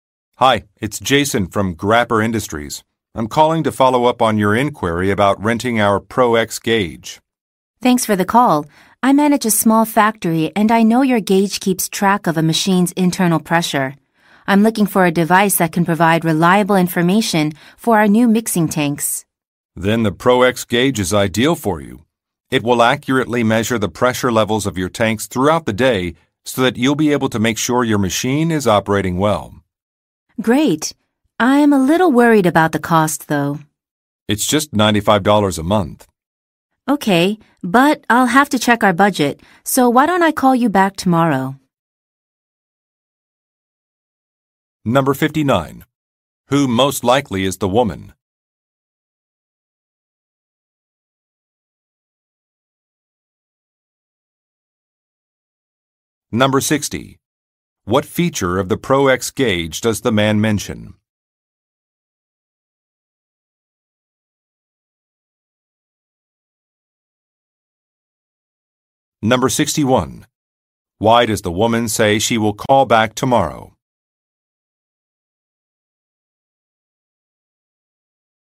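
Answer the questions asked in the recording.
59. A factory manager
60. It accurately measures tank pressure levels throughout the day
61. She has to check the budget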